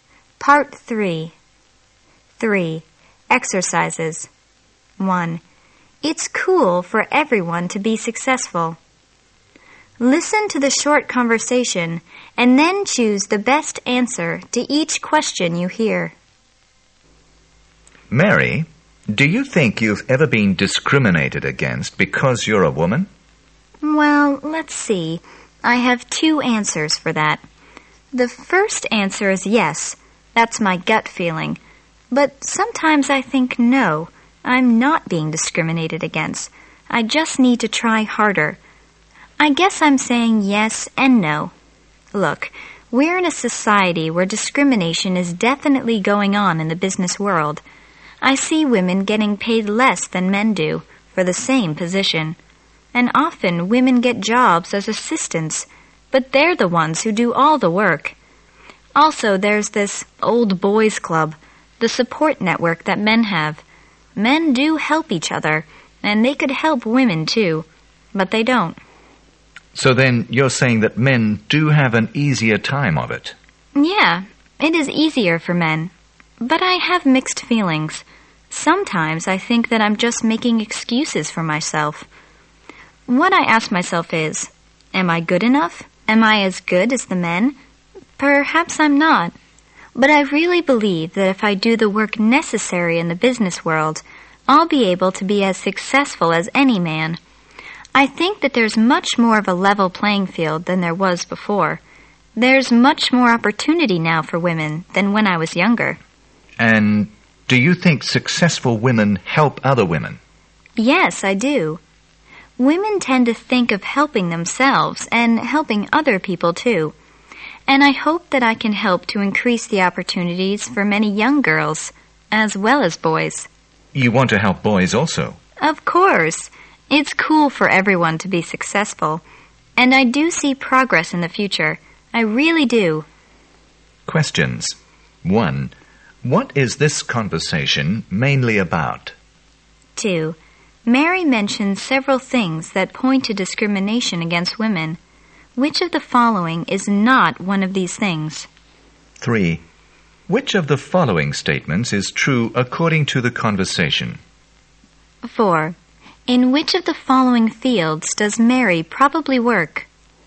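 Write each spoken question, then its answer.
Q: What is this conversation mainly about?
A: Whether Mary, as a woman, faces discrimination in the business world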